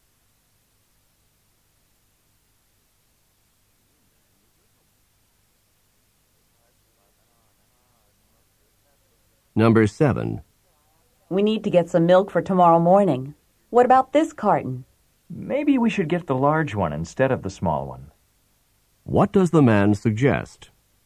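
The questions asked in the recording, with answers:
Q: What does the man suggest?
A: Buying the large carton of milk instead of the small one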